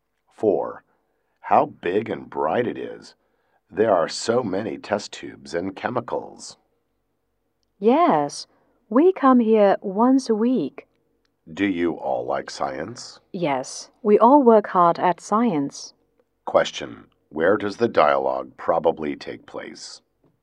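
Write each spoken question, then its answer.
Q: Where does the dialogue probably take place?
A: In a science lab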